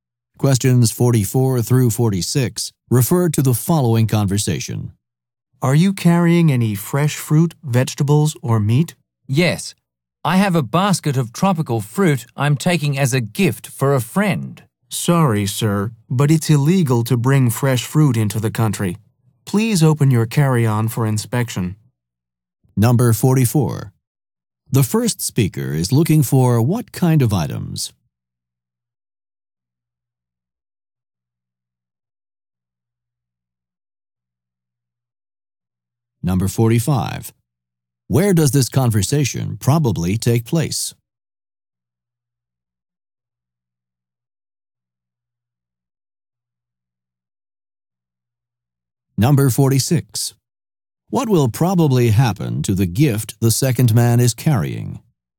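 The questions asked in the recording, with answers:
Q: The first speaker is looking for what kind of items?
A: Fresh fruit, vegetables, or meat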